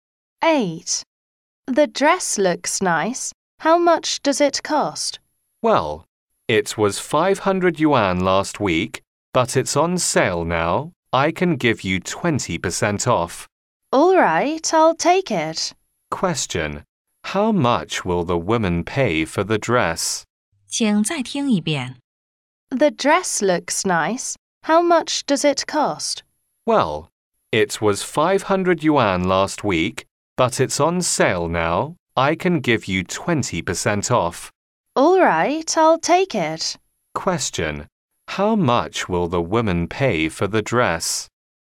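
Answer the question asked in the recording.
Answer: 400 yuan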